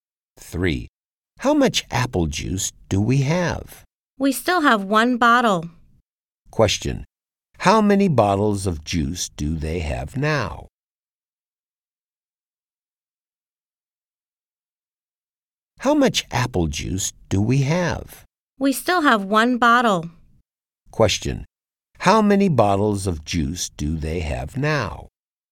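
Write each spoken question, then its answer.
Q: Question. How many bottles of juice do they have now?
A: One bottle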